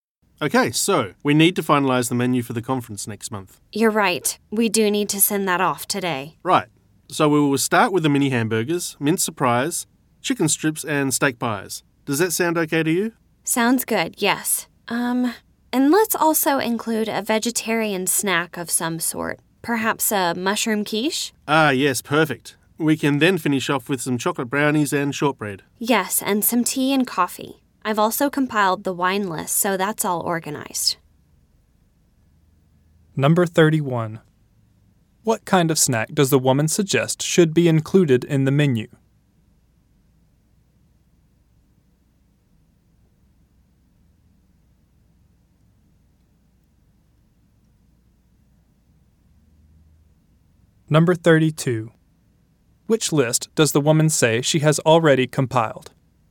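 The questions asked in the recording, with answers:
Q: Which list does the woman say she has already compiled?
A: The wine list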